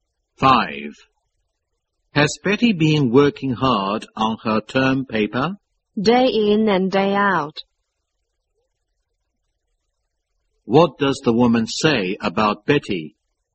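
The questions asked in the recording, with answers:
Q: What does the woman say about Betty?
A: She works hard on it every day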